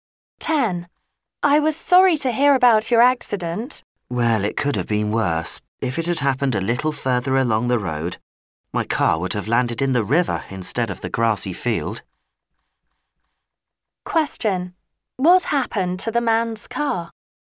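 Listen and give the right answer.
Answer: It landed in a grassy field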